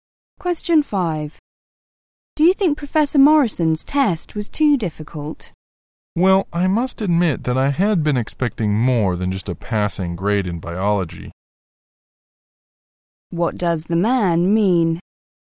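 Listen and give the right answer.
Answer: He only got a passing grade, lower than he expected.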